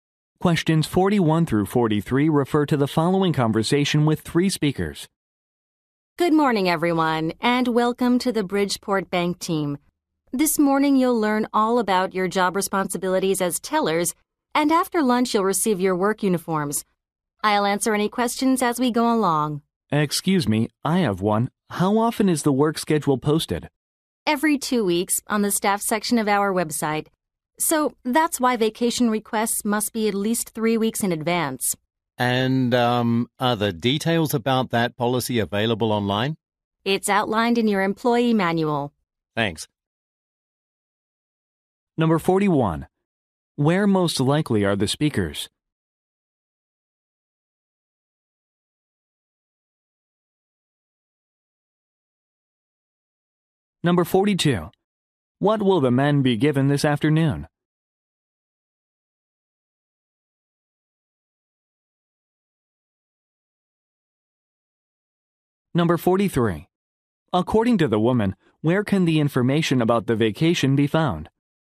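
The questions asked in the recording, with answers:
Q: Where most likely are the speakers?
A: At a bank

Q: What will the men be given this afternoon?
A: Work uniforms

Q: According to the woman, where can the information about the vacation be found?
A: In the employee manual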